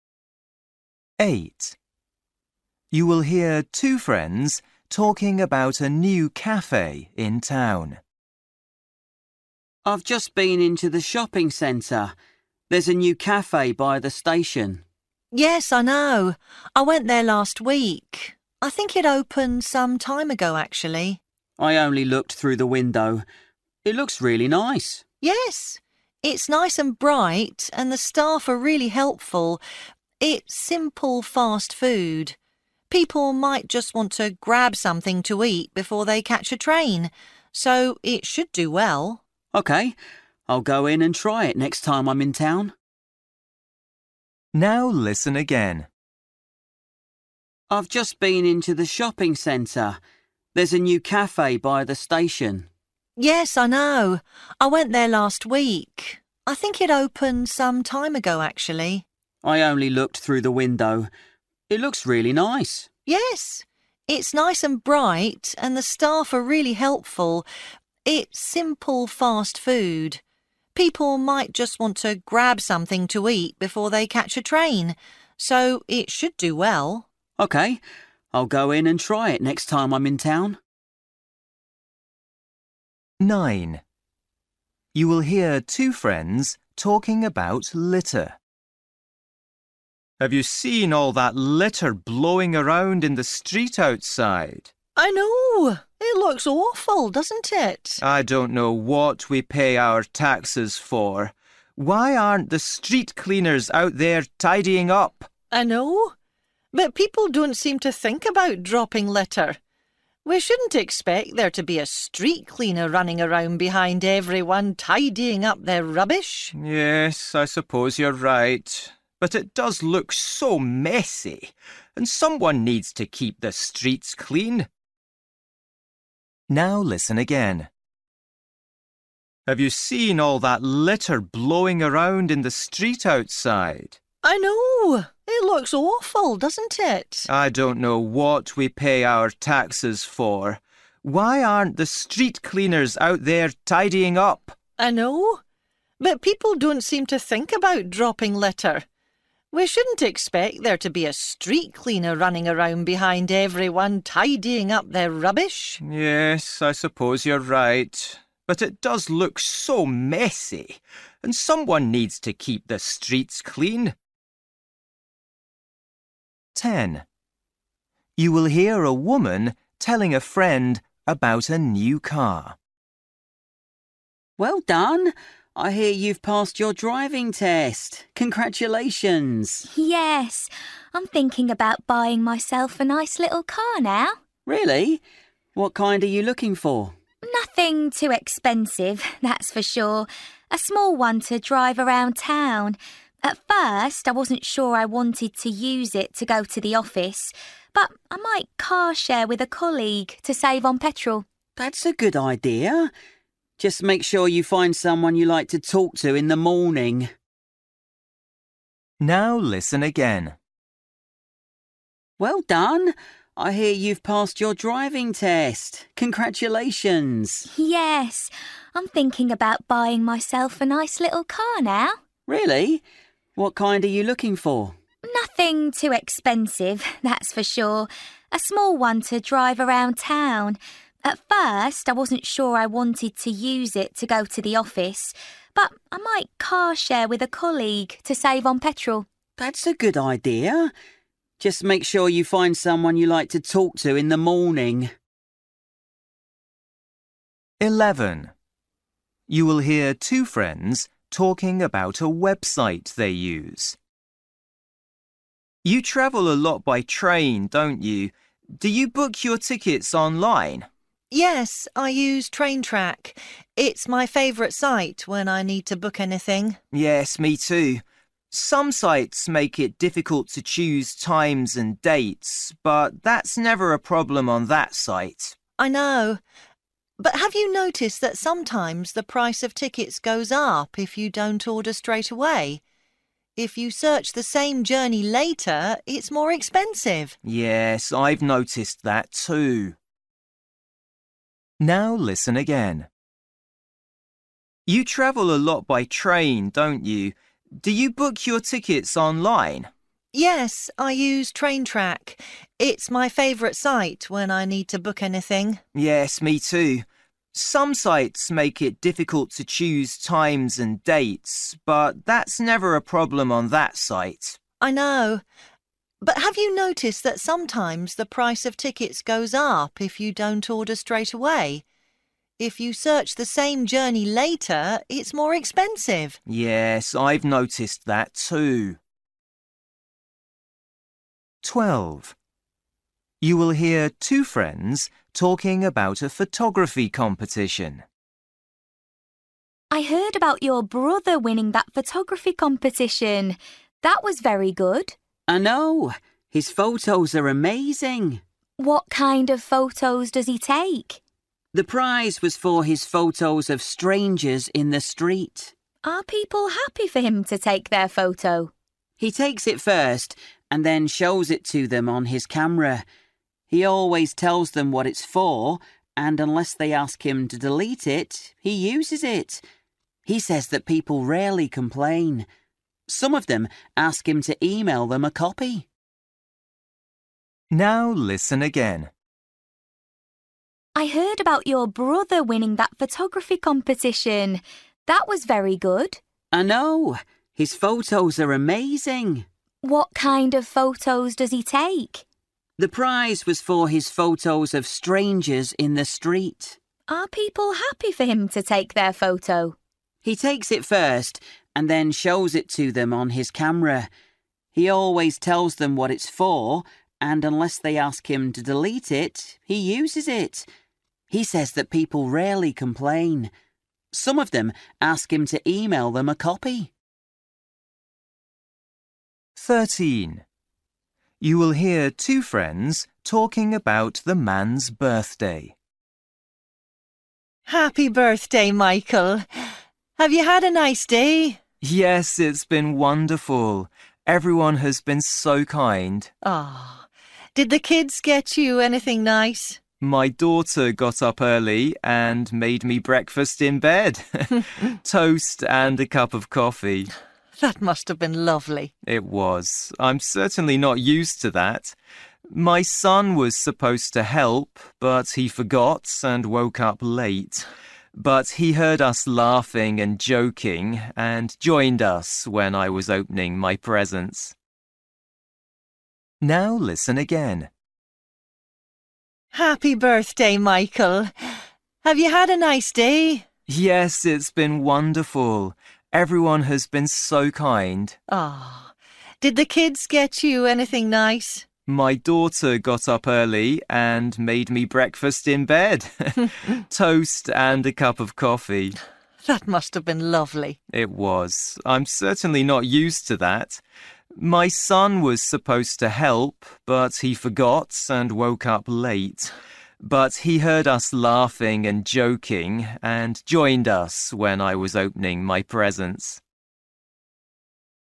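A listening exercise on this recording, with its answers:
For each question, choose the correct answer.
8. You will hear two friends talking about a new cafe in town. What does the woman say about it?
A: It should do well because people can grab fast food before catching a train.

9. You will hear two friends talking about litter. They both agree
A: that the litter looks awful/messy.

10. You will hear a woman telling a friend about a new car. What does she say about it?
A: She might share it with a colleague to go to work.

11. You will hear two friends talking about a website they use. They both think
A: it is easy to choose times and dates on it.

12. You will hear two friends talking about a photography competition. The man's brother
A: photographs strangers in the street and shows them the photos afterwards.

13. You will hear two friends talking about the man's birthday. What does he say about the morning?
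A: His daughter made him breakfast in bed, which he is not used to.

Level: Luyện nghe trình độ B1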